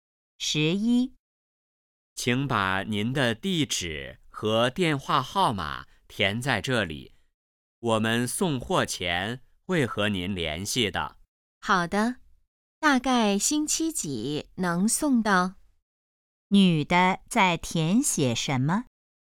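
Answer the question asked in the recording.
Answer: 地址和电话号码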